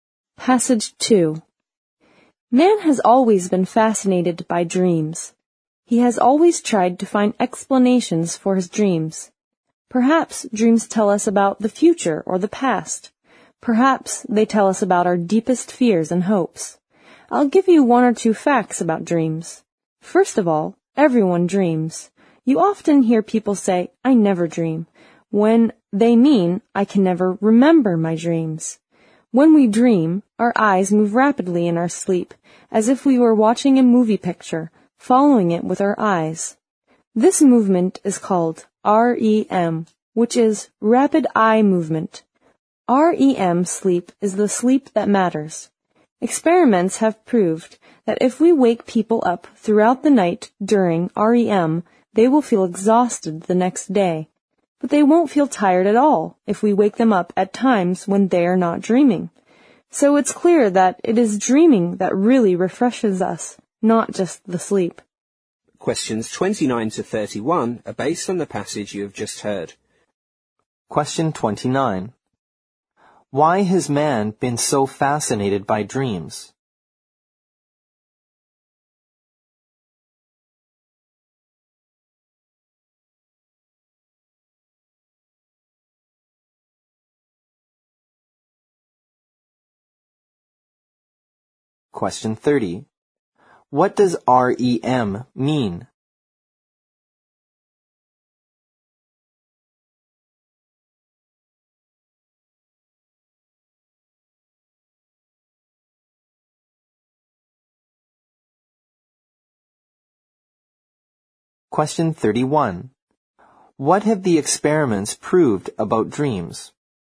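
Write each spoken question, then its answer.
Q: What does REM mean?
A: Rapid eye movement

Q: What have the experiments proved about dreams?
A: Dreaming, not just sleep, refreshes us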